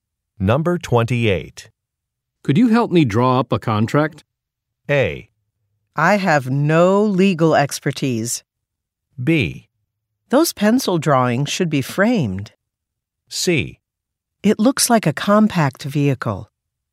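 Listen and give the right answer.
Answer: A: I have no legal expertise.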